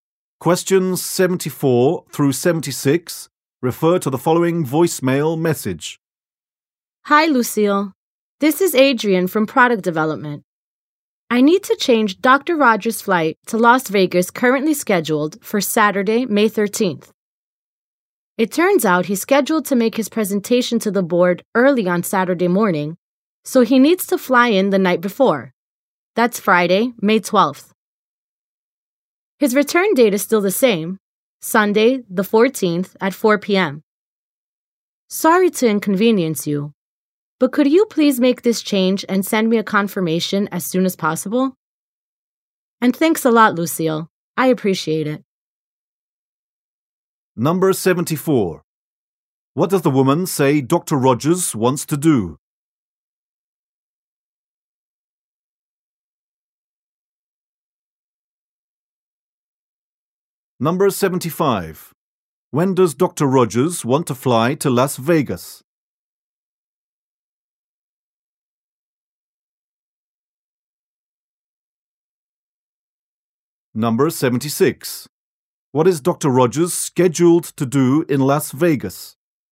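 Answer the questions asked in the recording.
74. Change his flight to Las Vegas.
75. Friday, May 12th
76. Give a presentation to the board.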